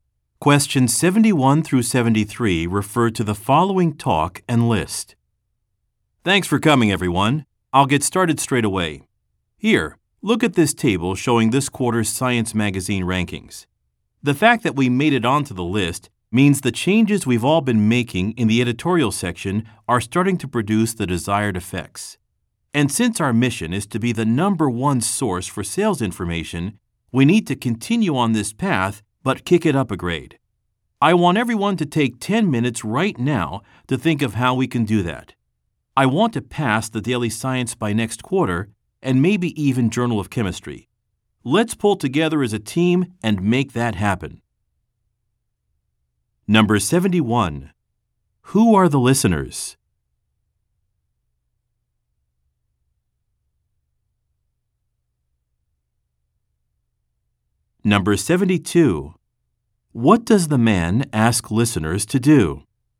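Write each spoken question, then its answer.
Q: What does the man ask listeners to do?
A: Take 10 minutes to think of ways to improve the magazine's ranking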